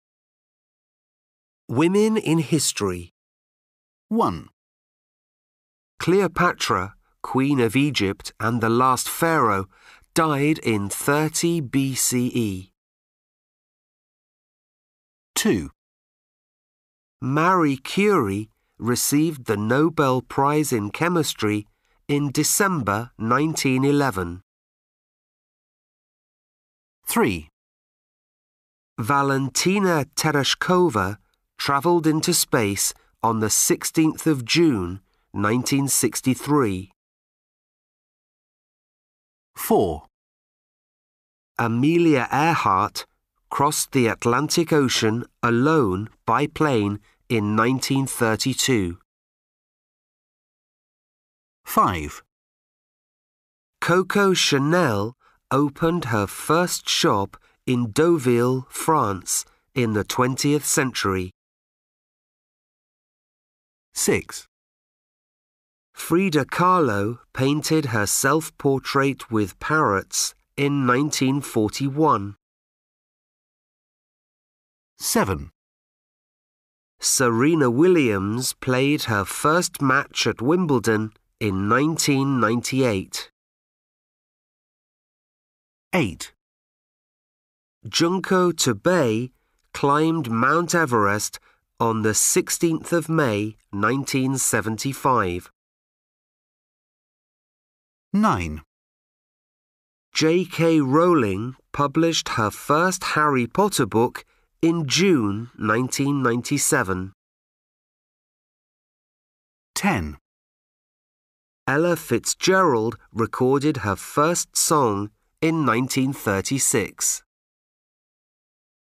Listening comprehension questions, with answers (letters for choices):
1. Listen, do the quiz. Choose A, B or C.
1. Cleopatra, Queen of Egypt and the last pharaoh, ............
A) in 180 BCE.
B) in 70 BCE.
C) in 30 BCE.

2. Marie Curie ............ the Nobel Prize in chemistry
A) in December 1911.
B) in December 1925.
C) in December 1950.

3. Valentina Tereshkova ............ into space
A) on 12th August 1961.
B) on 3rd April 1962.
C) on 16th June 1963.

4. Amelia Earhart ............ the Atlantic Ocean, alone, by plane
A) in 1932.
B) in 1941.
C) in 1950.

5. Coco Chanel ............ her first shop in Deauville, France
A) in the 18th century.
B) in the 19th century.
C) in the 20th century.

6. Frida Kahlo ............ her self-portrait with parrots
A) in 1920.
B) in 1935.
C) in 1941.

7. Serena Williams ............ her first match at Wimbledon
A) in 1996.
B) in 1998.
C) in 2000.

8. Junko Tabei ............ Mount Everest.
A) on 16th May 1975.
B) on 5th April 1977.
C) on 12th May 1980.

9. J.K. Rowling ............ her first Harry Potter book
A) in March 1985.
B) in June 1997.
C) in July 2004.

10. Ella Fitzgerald ............ her first song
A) in 1928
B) in 1930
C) in 1936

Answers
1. C
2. A
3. C
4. A
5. C
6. C
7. B
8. A
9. B
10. C

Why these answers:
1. Cleopatra, Queen of Egypt and the last pharaoh, died in 30 BCE.
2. Marie Curie received the Nobel Prize in chemistry in December 1911.
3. Valentina Tereshkova travelled into space on the 16th of June 1963.
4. Amelia Earhart crossed the Atlantic Ocean, alone, by plane in 1932.
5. Coco Chanel opened her first shop in Deauville, France in the 20th century.
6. Frida Kahlo painted her self-portrait with parrots in 1941.
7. Serena Williams played her first match at Wimbledon in 1998.
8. Junko Tabei climbed Mount Everest on the 16th of May 1975.
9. J.K. Rowling published her first Harry Potter book in June 1997.
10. Ella Fitzgerald recorded her first song in 1936.

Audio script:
Women in History.
1 Man: Cleopatra, Queen of Egypt and the last pharaoh, died in 30 BCE.
2 Man: Marie Curie received the Nobel Prize in chemistry in December 1911.
3 Man: Valentina Tereshkova travelled into space on the 16th of June 1963.
4 Man: Amelia Earhart crossed the Atlantic Ocean, alone, by plane in 1932.
5 Man: Coco Chanel opened her first shop in Deauville, France in the 20th century.
6 Man: Frida Kahlo painted her self-portrait with parrots in 1941.
7 Man: Serena Williams played her first match at Wimbledon in 1998.
8 Man: Junko Tabei climbed Mount Everest on the 16th of May 1975.
9 Man: J.K. Rowling published her first Harry Potter book in June 1997.
10 Man: Ella Fitzgerald recorded her first song in 1936.